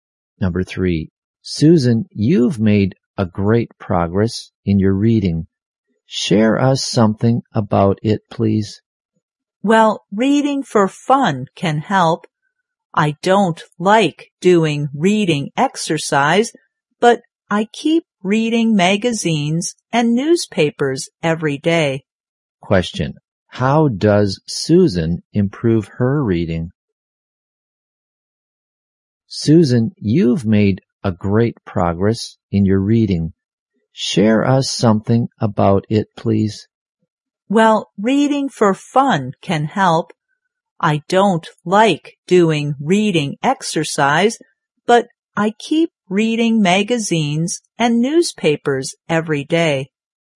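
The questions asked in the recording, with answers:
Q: How does Susan improve her reading?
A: By reading magazines and newspapers every day for fun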